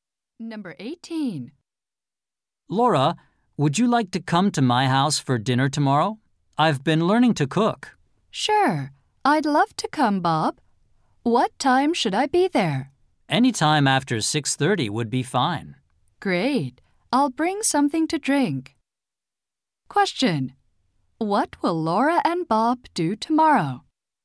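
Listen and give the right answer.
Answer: Have dinner at Bob's house.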